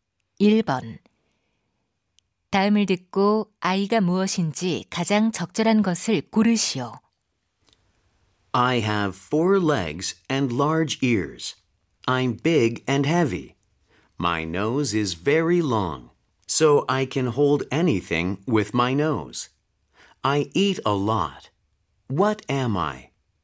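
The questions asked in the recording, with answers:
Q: 다음을 듣고 아이가 무엇인지 가장 적절한 것을 고르시오.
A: 코끼리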